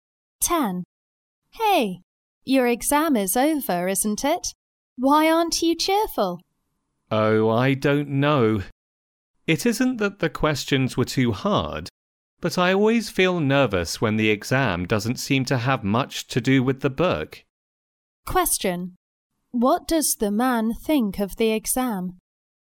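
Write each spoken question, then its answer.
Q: What does the man think of the exam?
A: It didn't have much to do with the book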